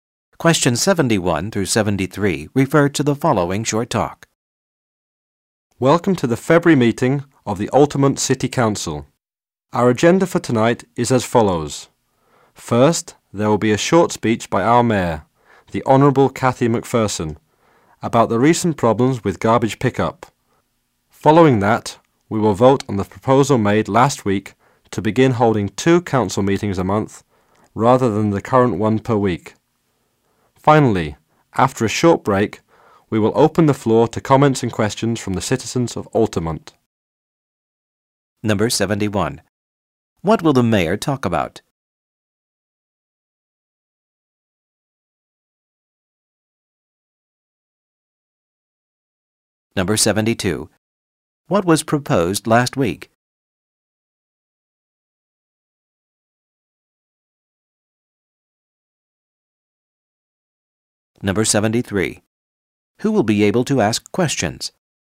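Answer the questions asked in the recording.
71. Recent problems with garbage pickup
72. Changing the number of council meetings to two a month
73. The citizens of Altamont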